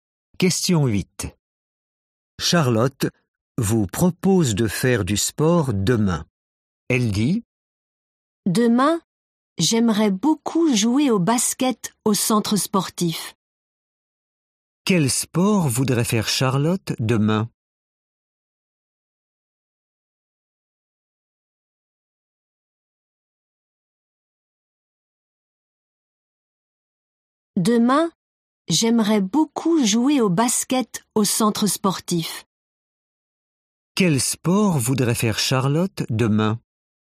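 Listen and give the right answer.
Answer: Le basket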